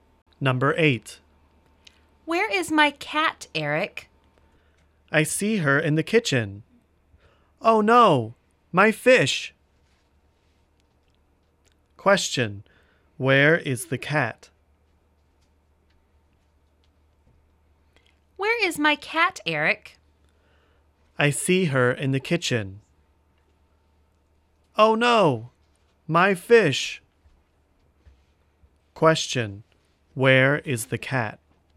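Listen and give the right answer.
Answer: In the kitchen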